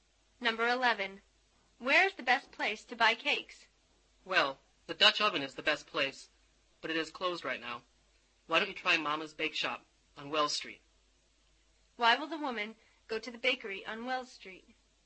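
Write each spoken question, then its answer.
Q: Why will the woman go to the bakery on Wells Street?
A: Because the Dutch oven is closed now.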